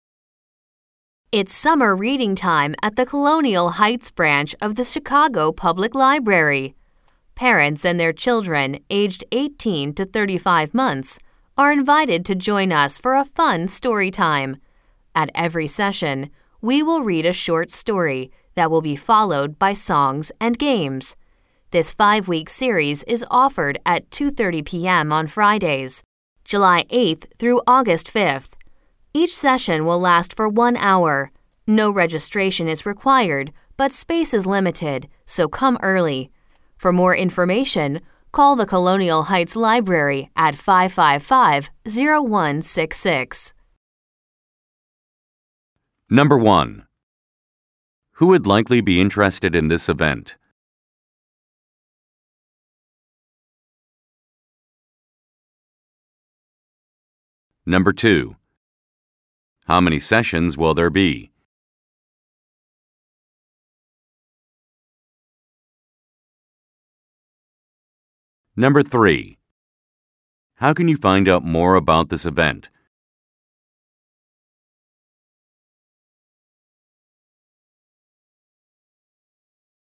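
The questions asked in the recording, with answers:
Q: Who would likely be interested in this event?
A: Parents of children aged 18 to 35 months

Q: How many sessions will there be?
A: Five

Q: How can you find out more about this event?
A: Call the Colonial Heights Library at 555-0166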